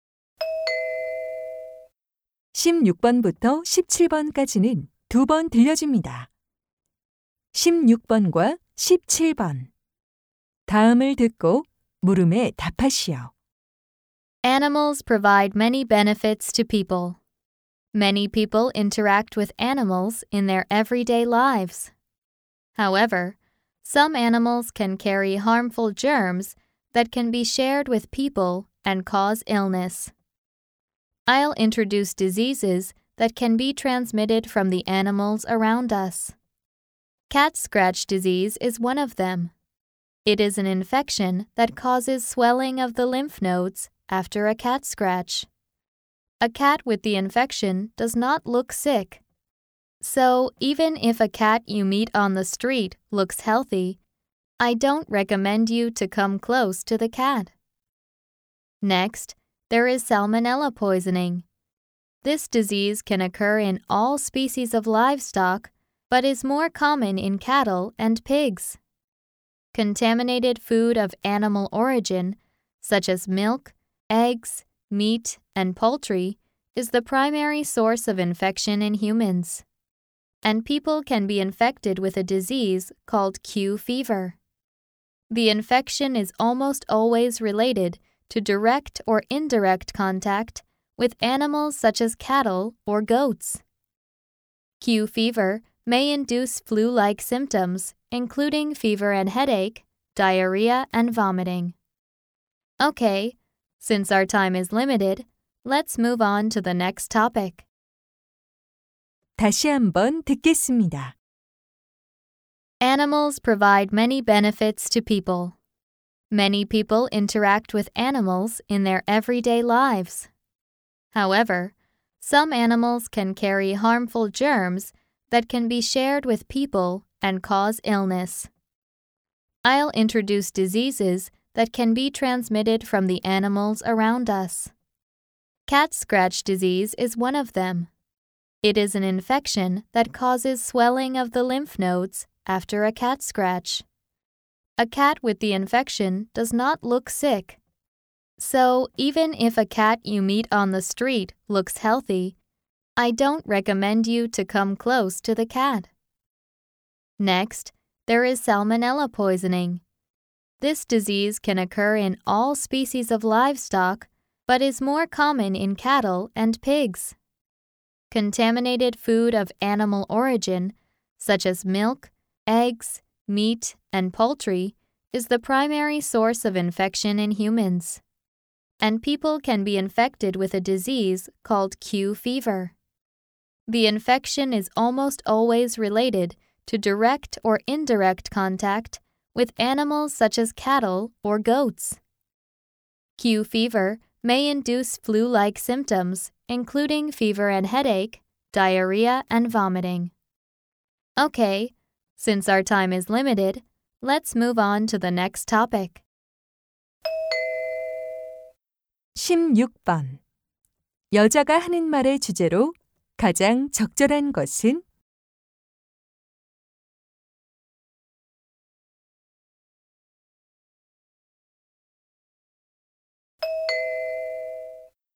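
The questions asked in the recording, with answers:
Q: 여자가 하는 말의 주제로 가장 적절한 것은?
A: 동물에게서 사람에게 옮을 수 있는 질병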